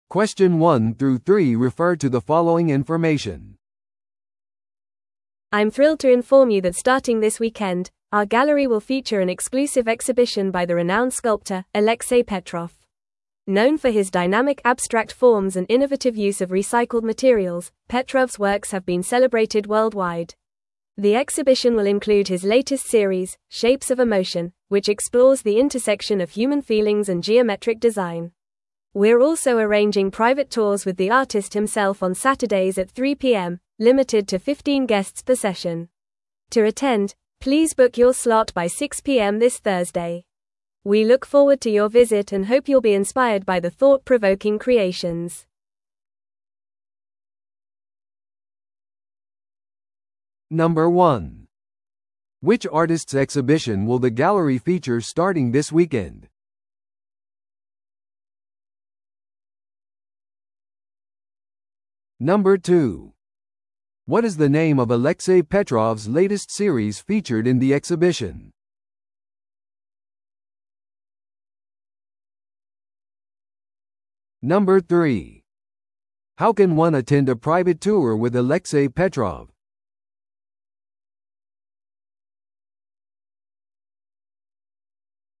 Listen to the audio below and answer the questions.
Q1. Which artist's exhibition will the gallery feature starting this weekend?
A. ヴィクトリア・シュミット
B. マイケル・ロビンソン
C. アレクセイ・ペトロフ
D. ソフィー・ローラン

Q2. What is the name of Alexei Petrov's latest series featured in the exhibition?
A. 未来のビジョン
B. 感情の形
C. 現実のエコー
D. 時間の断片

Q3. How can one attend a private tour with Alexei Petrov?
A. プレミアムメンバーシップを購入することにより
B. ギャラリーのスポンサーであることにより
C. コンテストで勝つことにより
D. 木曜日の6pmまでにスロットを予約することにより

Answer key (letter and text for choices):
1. C. アレクセイ・ペトロフ
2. B. 感情の形
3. D. 木曜日の6pmまでにスロットを予約することにより

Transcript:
I'm thrilled to inform you that starting this weekend, our gallery will feature an exclusive exhibition by the renowned sculptor, Alexei Petrov. Known for his dynamic abstract forms and innovative use of recycled materials, Petrov's works have been celebrated worldwide. The exhibition will include his latest series, 'Shapes of Emotion,' which explores the intersection of human feelings and geometric design. We're also arranging private tours with the artist himself on Saturdays at 3pm, limited to fifteen guests per session. To attend, please book your slot by 6pm this Thursday. We look forward to your visit and hope you'll be inspired by the thought-provoking creations.